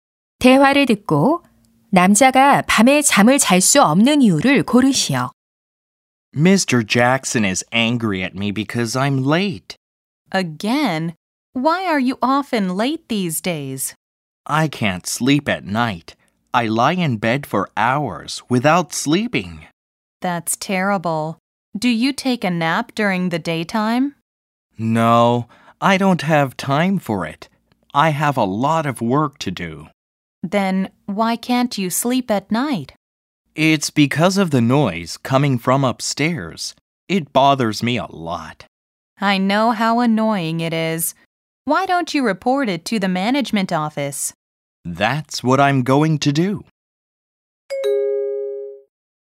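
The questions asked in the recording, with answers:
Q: 대화를 듣고 남자가 밤에 잠을 잘 수 없는 이유를 고르시오.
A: 위층에서 나는 소음 때문에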